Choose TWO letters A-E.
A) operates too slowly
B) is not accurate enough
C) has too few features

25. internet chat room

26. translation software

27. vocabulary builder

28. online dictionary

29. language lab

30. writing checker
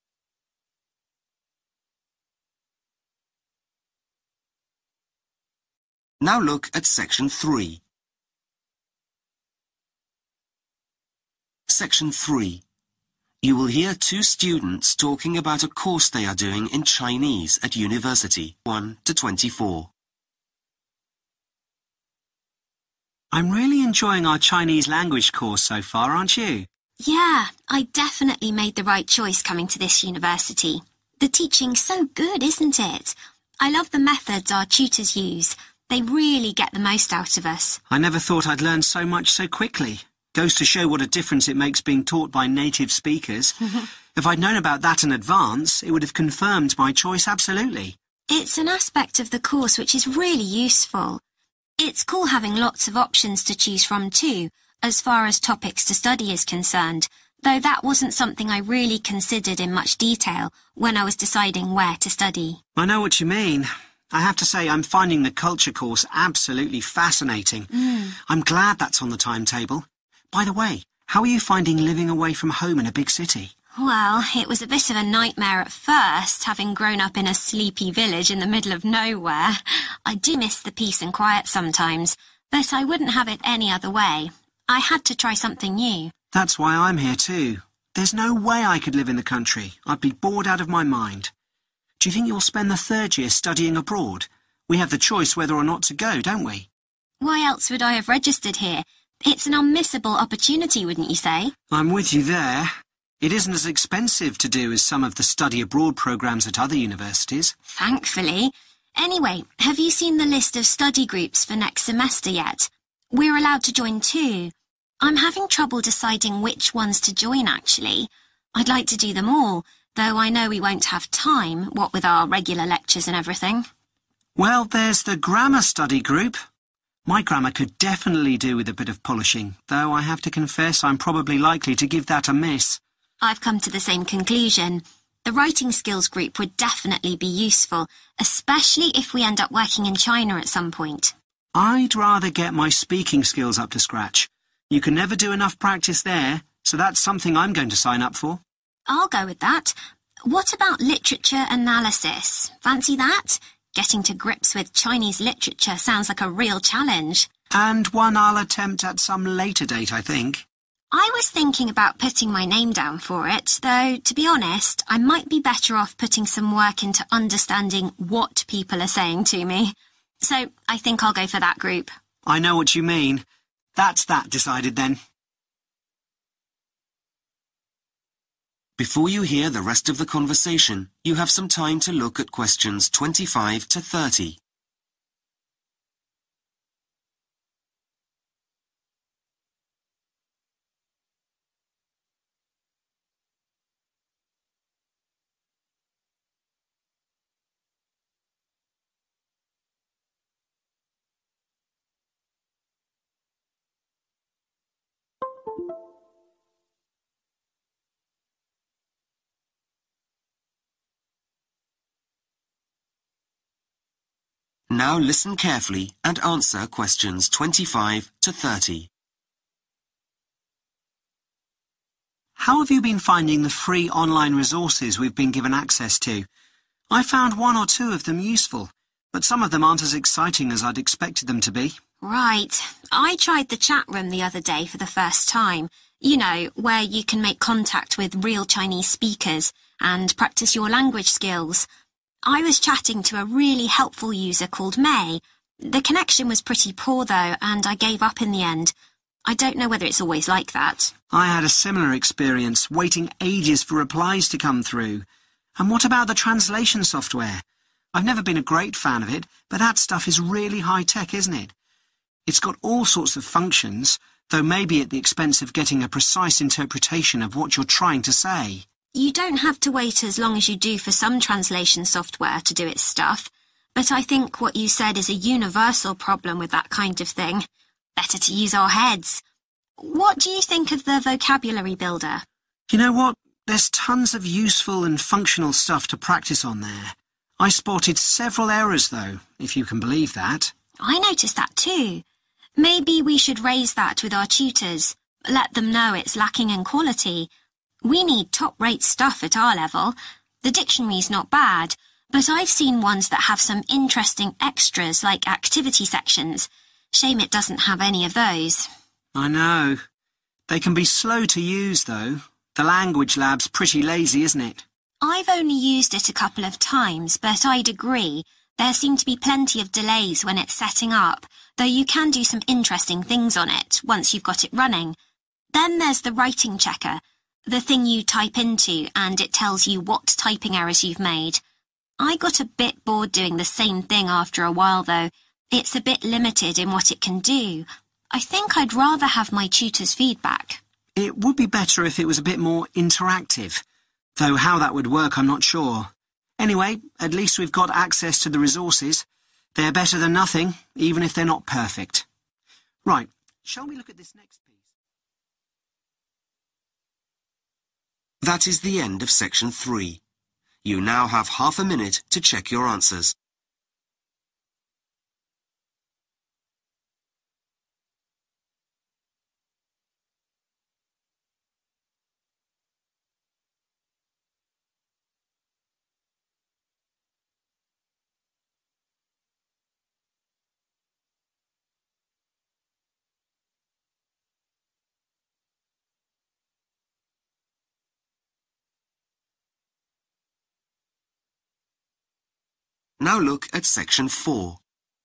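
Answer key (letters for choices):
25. A
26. B
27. B
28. C
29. A
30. C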